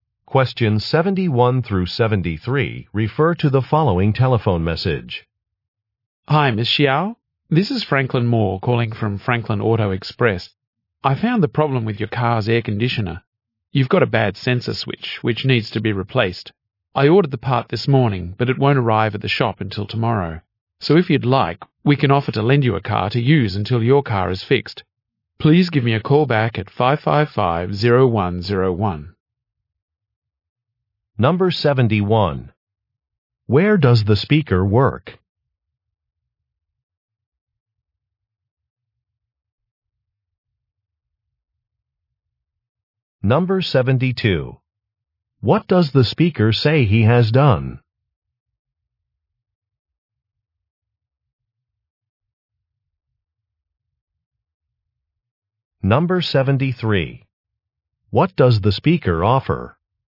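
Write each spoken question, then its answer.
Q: Where does the speaker work?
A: At a car repair shop (Franklin Auto Express)

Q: What does the speaker say he has done?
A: Ordered a replacement part

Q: What does the speaker offer?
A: To lend a car until hers is fixed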